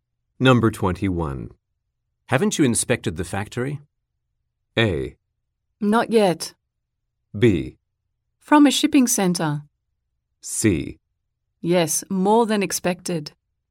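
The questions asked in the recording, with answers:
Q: Haven't you inspected the factory?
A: A: Not yet.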